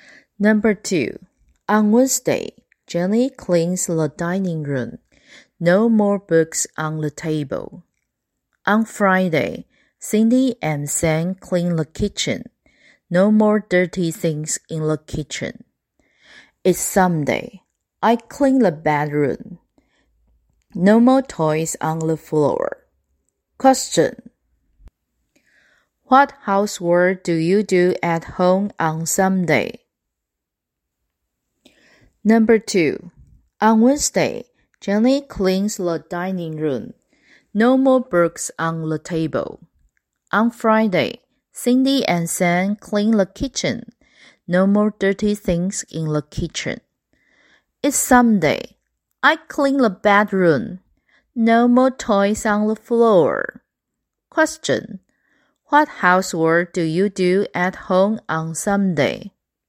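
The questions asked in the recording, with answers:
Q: Question. What housework do you do at home on Sunday?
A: I clean the bedroom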